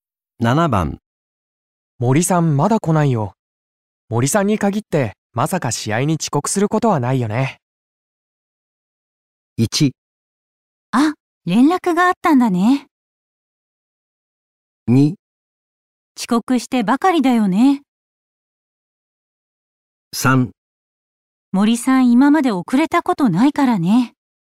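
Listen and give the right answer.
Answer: 3: 森さん今まで遅れたことないからね。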